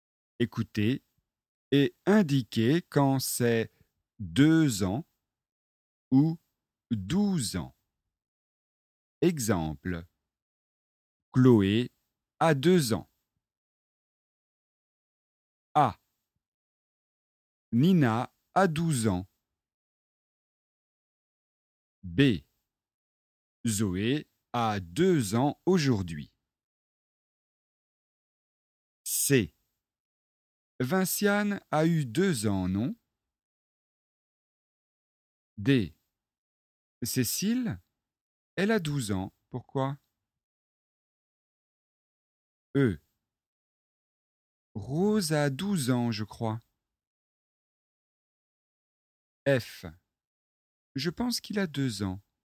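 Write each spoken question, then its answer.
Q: Nina a 12 ans.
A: 12 ans

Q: Zoé a 2 ans aujourd'hui.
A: 2 ans

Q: Vinciane a eu 2 ans, non?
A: 2 ans

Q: Cécile, elle a 12 ans, pourquoi?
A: 12 ans

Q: Rose a 12 ans, je crois.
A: 12 ans

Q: Je pense qu'il a 2 ans.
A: 2 ans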